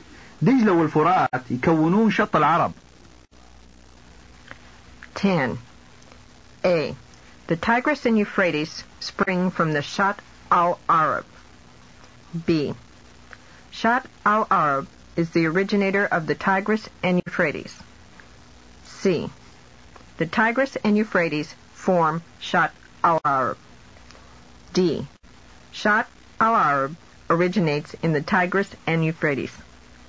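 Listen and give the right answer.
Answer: C: The Tigris and Euphrates form Shat al-Arab.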